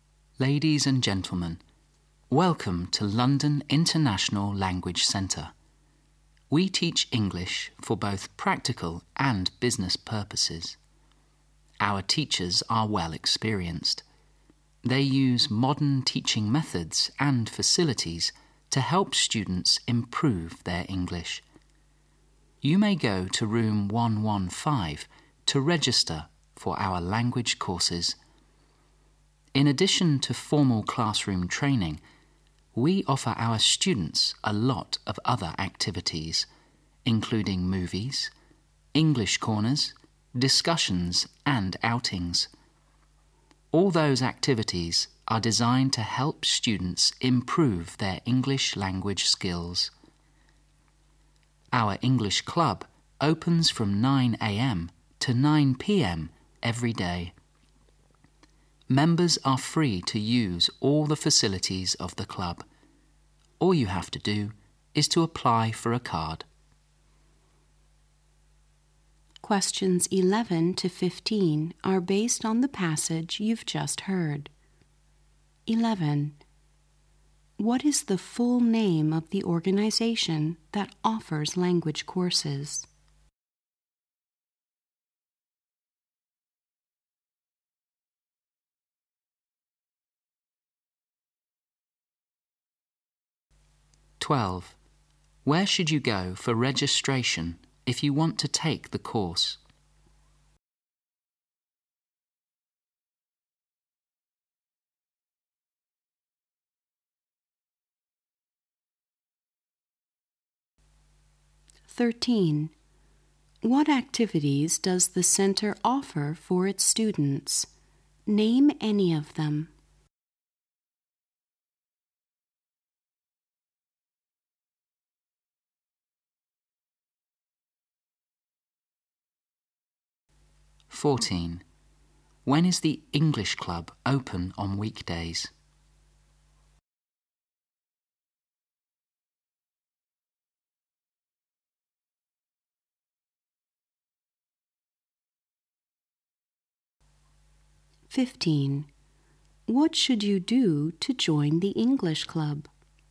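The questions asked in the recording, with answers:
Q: What is the full name of the organization that offers language courses?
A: London International Language Centre

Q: Where should you go for registration if you want to take the course?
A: Room 115

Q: What activities does the center offer for its students?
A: Movies, English corners, discussions, outings

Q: When is the English club open on weekdays?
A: From 9 a.m. to 9 p.m.

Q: What should you do to join the English club?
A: Apply for a card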